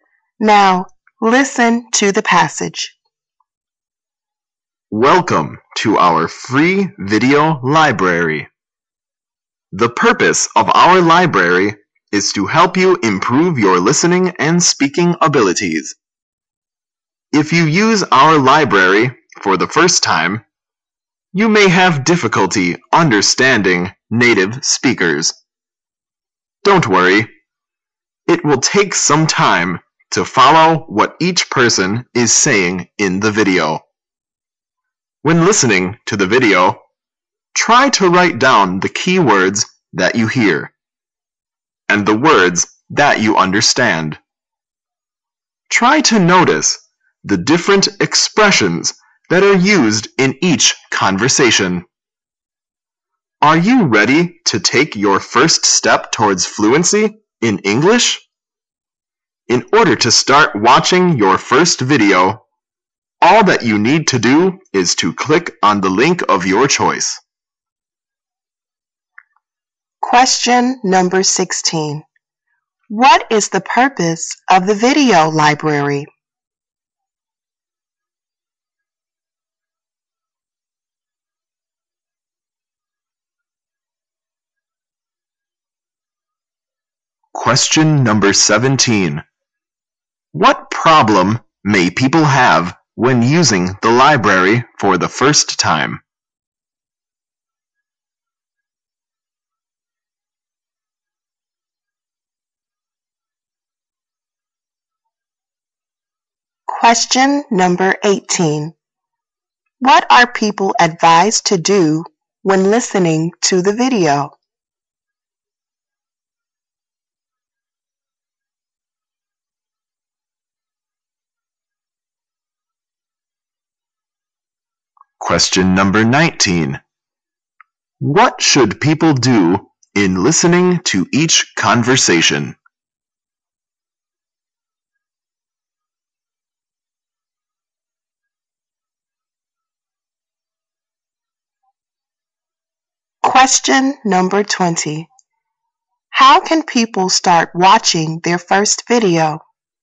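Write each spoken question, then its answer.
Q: What is the purpose of the video library?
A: To help improve listening and speaking abilities

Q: What problem may people have when using the library for the first time?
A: Difficulty understanding native speakers

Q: What are people advised to do when listening to the video?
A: Write down the keywords

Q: What should people do in listening to each conversation?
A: Notice the different expressions

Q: How can people start watching their first video?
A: Click on the link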